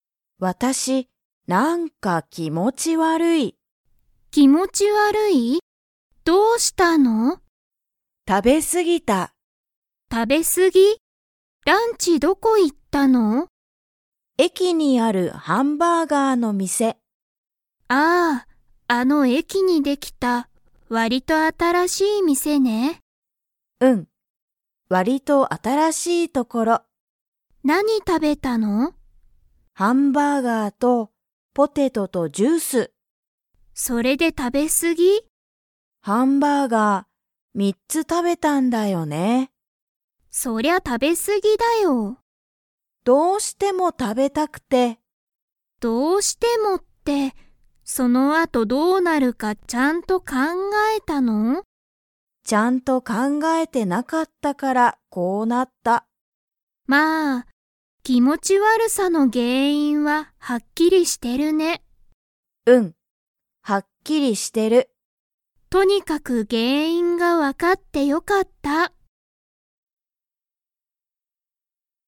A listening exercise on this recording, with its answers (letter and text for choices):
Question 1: ミカさんは、ハンバーガーをいくつ食たべましたか?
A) 1つ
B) 2つ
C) 3つ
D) 4つ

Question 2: 気持きもち悪わるさの原因げんいんは 。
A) はっきりしている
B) わからない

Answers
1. C) 3つ
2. A) はっきりしている